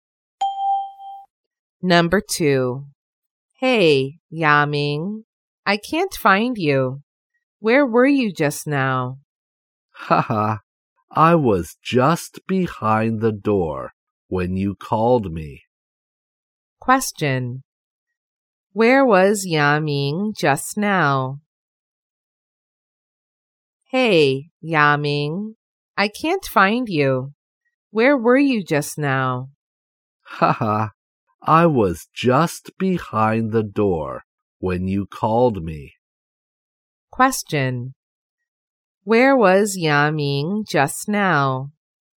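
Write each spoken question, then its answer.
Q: Where was Yaming just now?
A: Behind the door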